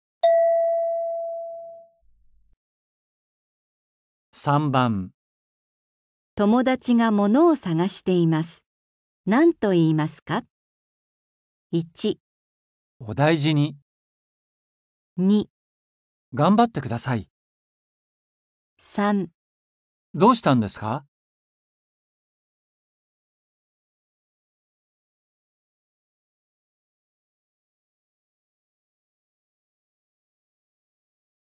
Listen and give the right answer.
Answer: 3

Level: 初級